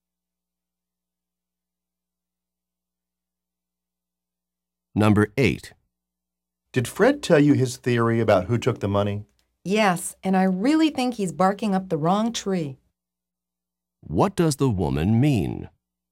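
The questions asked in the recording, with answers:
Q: What does the woman mean?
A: Fred's theory is wrong; he suspects the wrong person.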